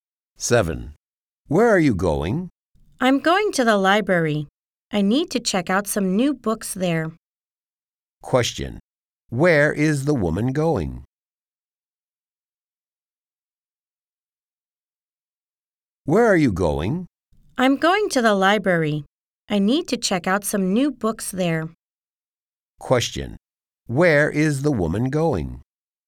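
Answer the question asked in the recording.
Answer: To the library.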